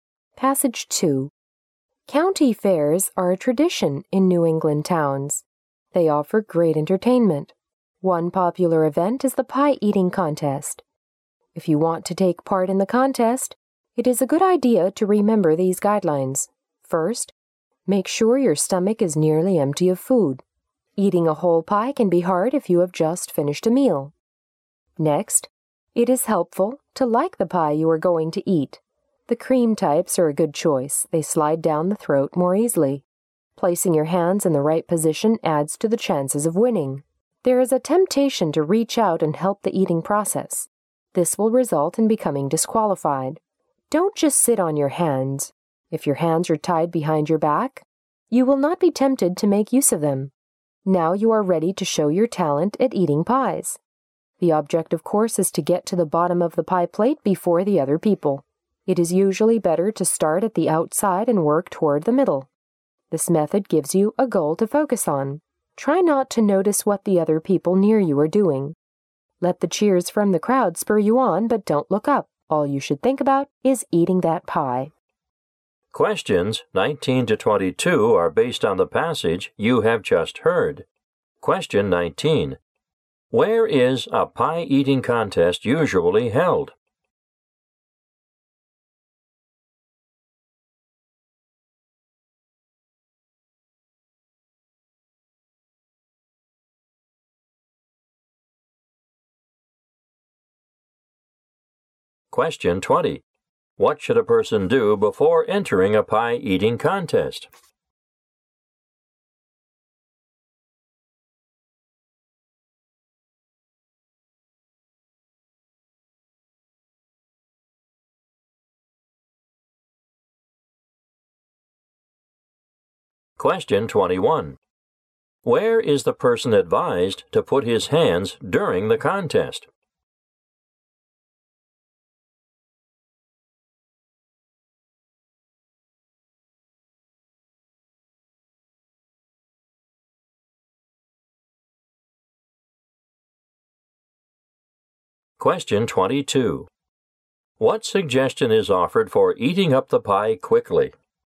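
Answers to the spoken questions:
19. At county fairs in New England.
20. Keep the stomach nearly empty.
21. Tied behind the back.
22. Start at the outside and work toward the middle.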